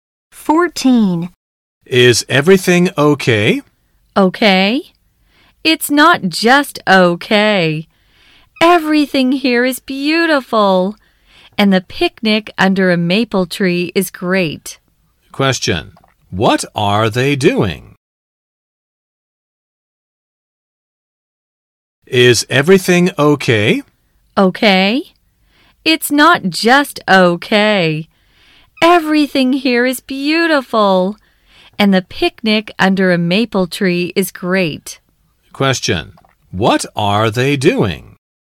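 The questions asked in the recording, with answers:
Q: What are they doing?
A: Having a picnic under a maple tree.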